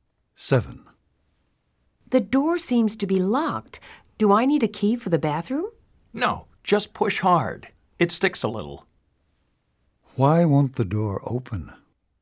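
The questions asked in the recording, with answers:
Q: Why won't the door open?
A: It sticks a little; you must push hard.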